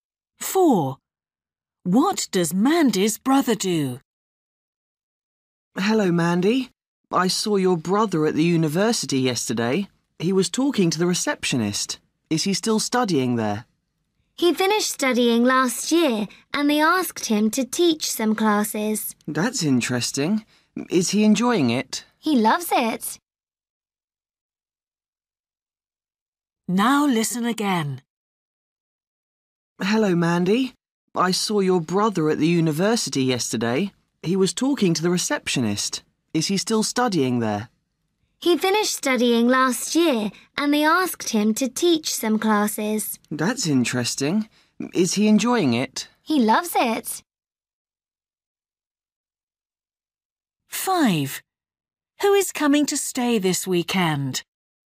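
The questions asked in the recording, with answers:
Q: What does Mandy's brother do?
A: He teaches at the university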